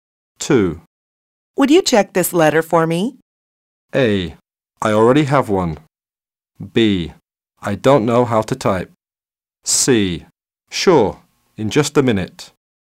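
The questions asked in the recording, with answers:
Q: Would you check this letter for me?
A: C: Sure, in just a minute.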